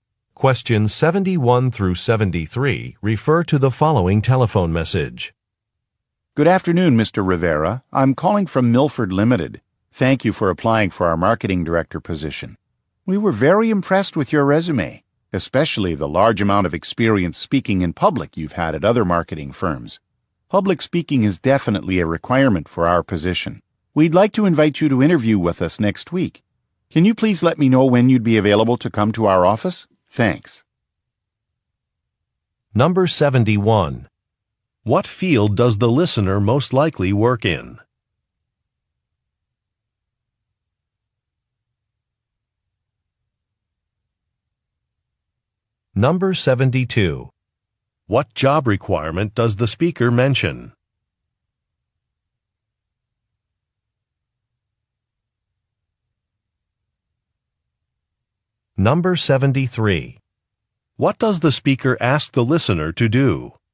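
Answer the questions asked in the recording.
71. Marketing
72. Public speaking
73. Tell when he is available to come to the office for an interview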